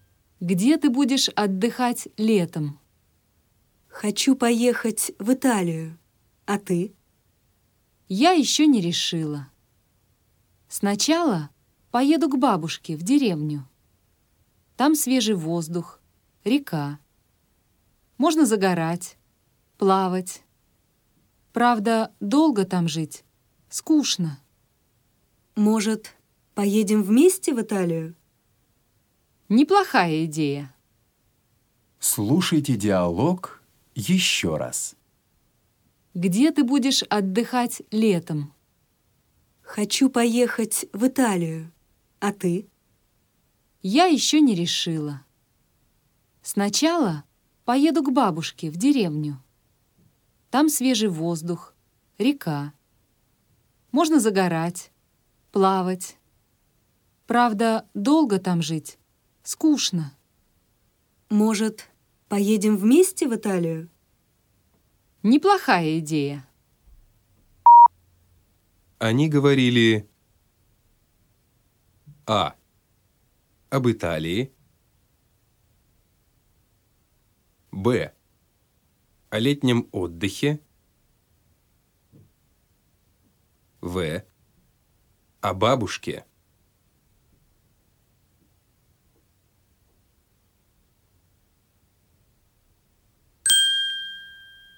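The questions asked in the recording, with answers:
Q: Они говорили об Италии, б.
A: Б: о летнем отдыхе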